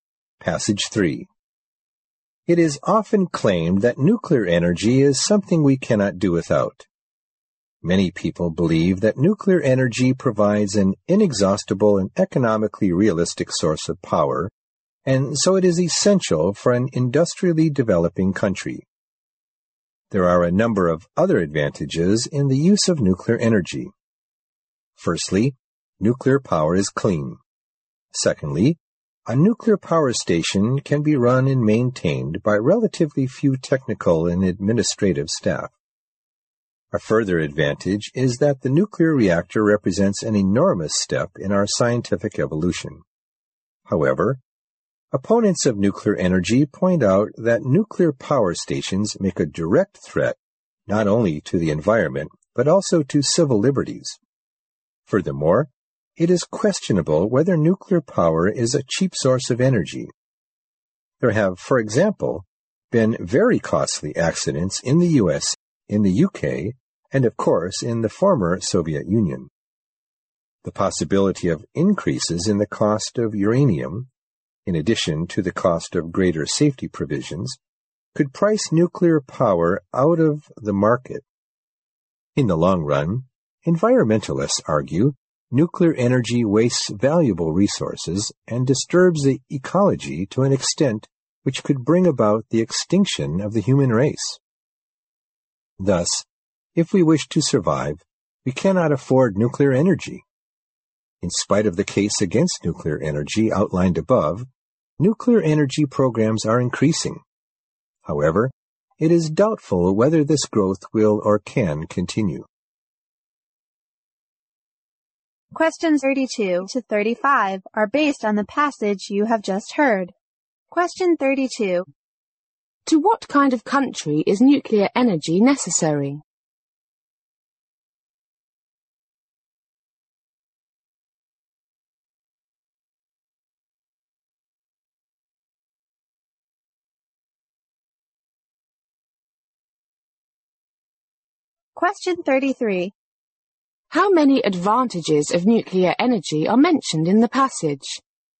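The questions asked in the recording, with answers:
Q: To what kind of country is nuclear energy necessary?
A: An industrially developing country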